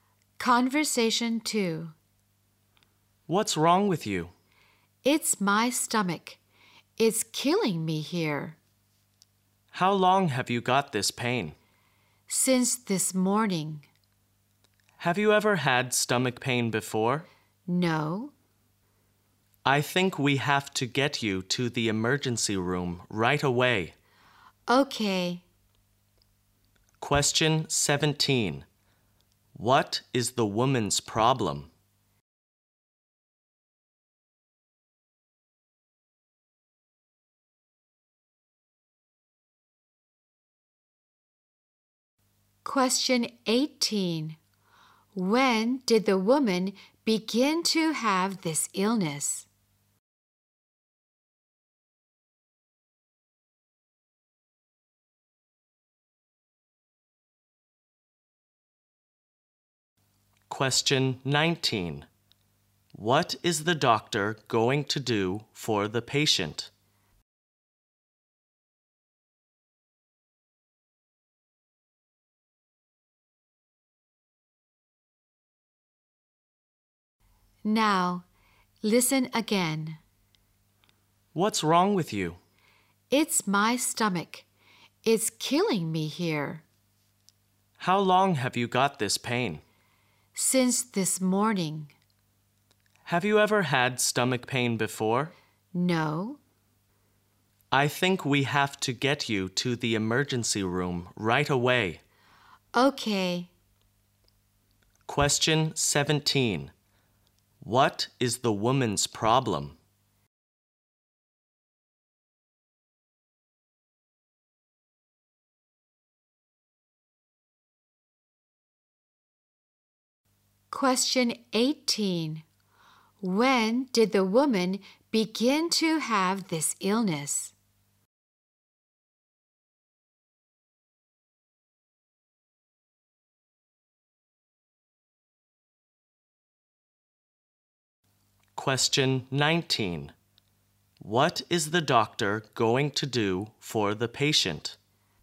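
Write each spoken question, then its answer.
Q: What is the woman's problem?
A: A stomach pain

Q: When did the woman begin to have this illness?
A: This morning

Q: What is the doctor going to do for the patient?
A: Take her to the emergency room right away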